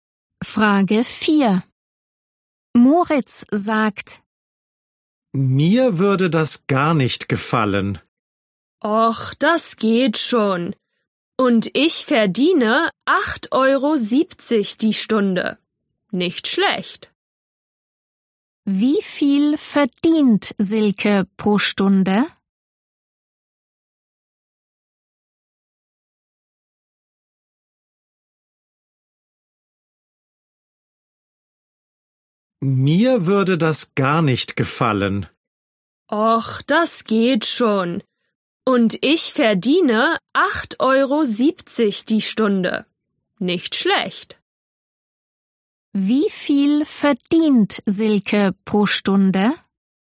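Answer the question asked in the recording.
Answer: 8,70 Euro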